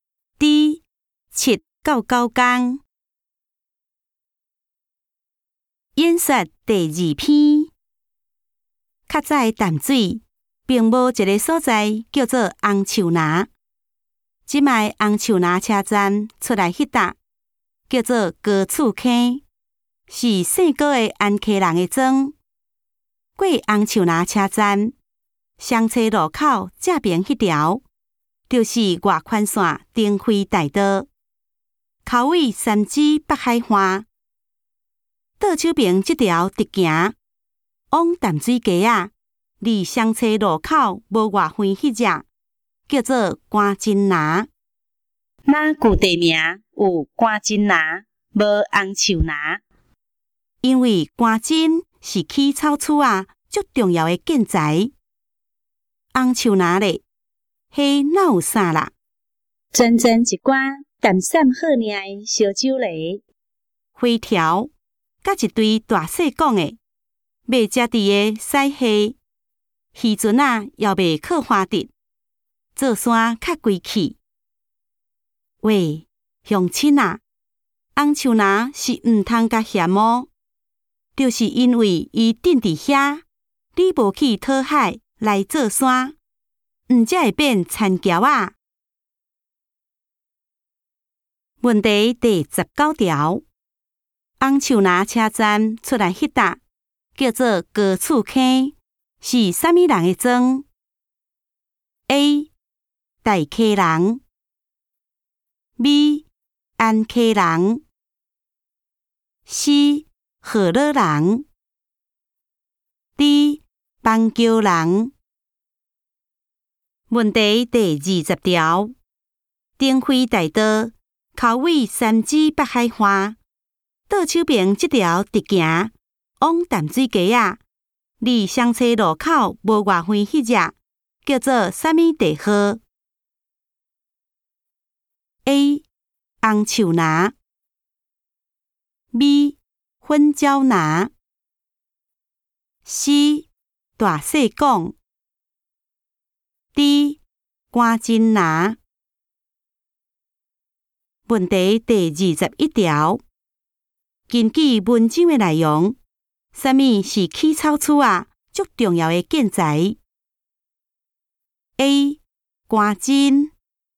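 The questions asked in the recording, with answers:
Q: 红树拿车站出来迄搭叫做高厝坑,是啥物人的庄 ?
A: B: 安溪人

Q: 丁辉大道口味三芝北海花,倒手边这条直行,往淡水街啊,离双车路口无外远那只,叫做什么地号 ?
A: D: 关金拿

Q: 根据文章的内容,什么是起草厝啊?足重要的建材 ?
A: A: 关金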